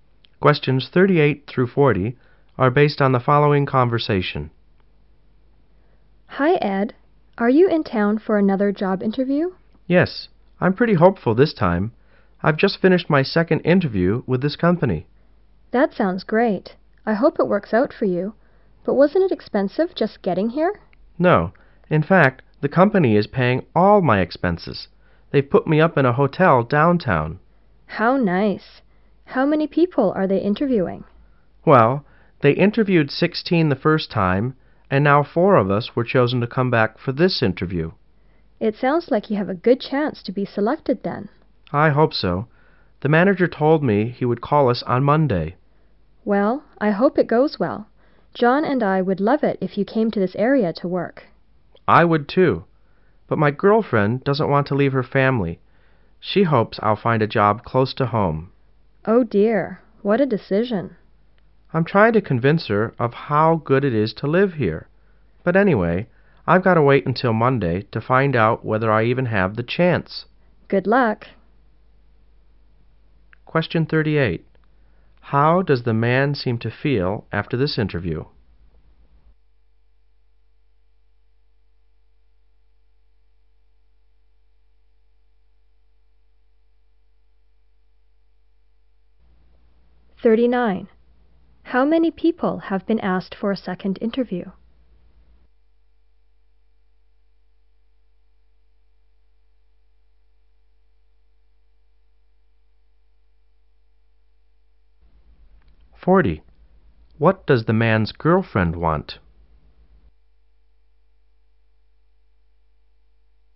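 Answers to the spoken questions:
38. Hopeful
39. Four
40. For him to find a job close to home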